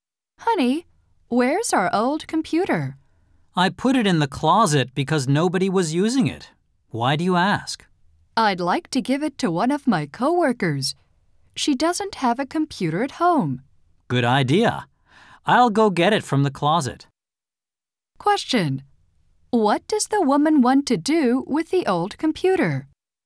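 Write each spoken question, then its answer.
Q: What does the woman want to do with the old computer?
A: Give it to one of her coworkers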